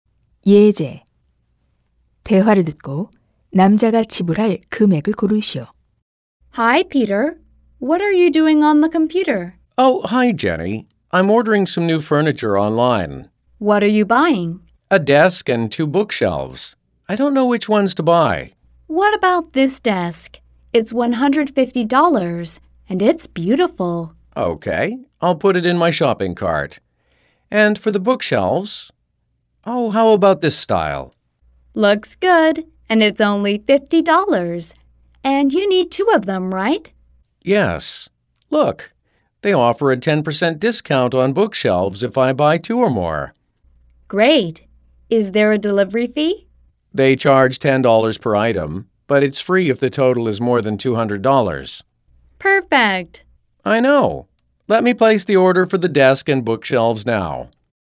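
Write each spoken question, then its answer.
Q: 대화를 듣고 남자가 지불할 금액을 고르시오.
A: $240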